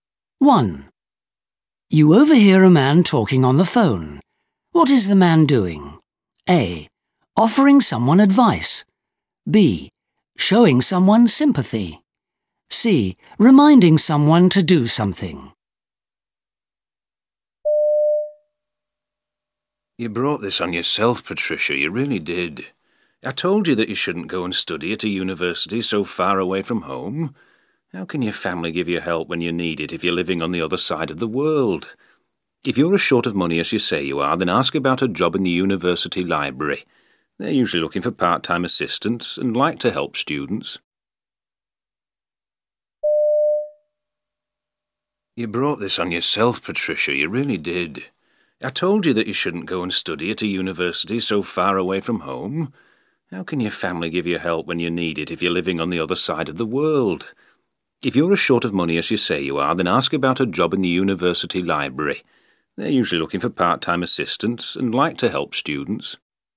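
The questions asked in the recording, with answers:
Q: What is the man doing?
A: A: Offering someone advice.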